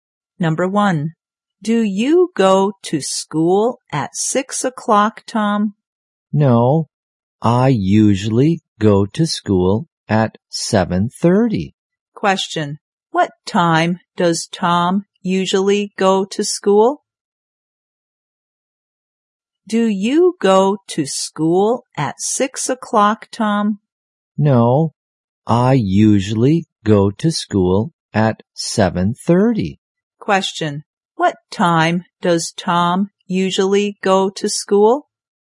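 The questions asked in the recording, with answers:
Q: what time does Tom usually go to school?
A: At 7:30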